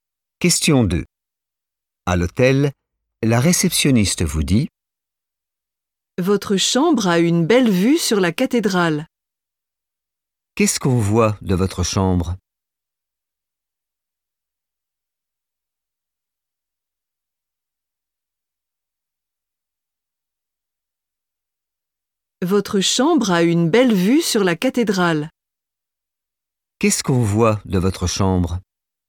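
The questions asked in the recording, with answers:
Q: Qu'est-ce qu'on voit de votre chambre?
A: la cathédrale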